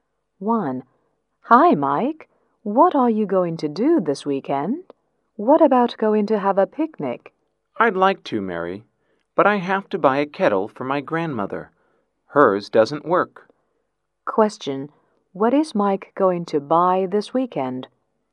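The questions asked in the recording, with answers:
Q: What is Mike going to buy this weekend?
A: A kettle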